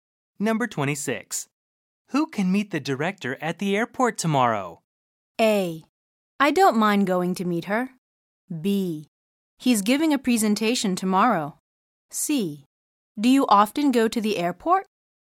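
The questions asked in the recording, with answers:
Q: Who can meet the director at the airport tomorrow?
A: A: I don't mind going to meet her.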